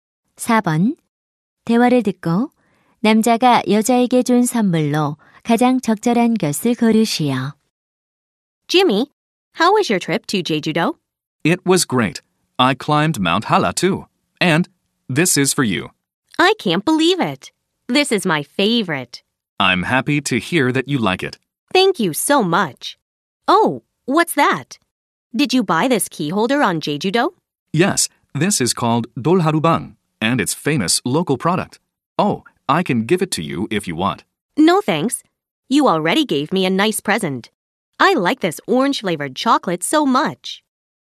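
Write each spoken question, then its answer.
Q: 대화를 듣고 남자가 여자에게 준 선물로 가장 적절한 것을 고르시오.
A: 오렌지 맛 초콜릿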